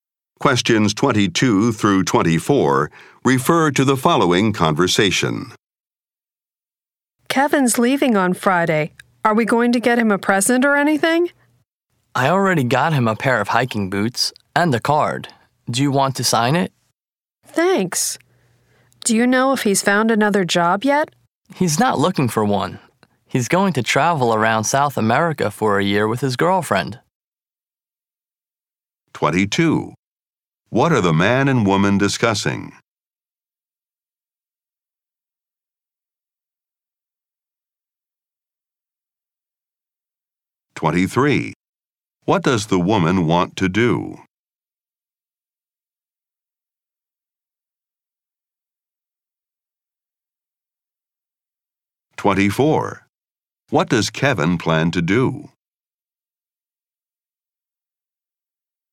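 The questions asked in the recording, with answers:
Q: What are the man and woman discussing?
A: A leaving present for Kevin

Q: What does Kevin plan to do?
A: Travel around South America for a year with his girlfriend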